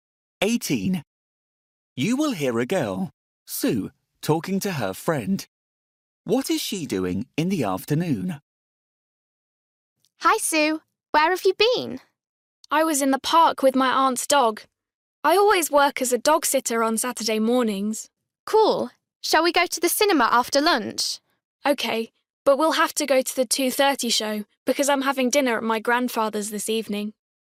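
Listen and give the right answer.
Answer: Going to the cinema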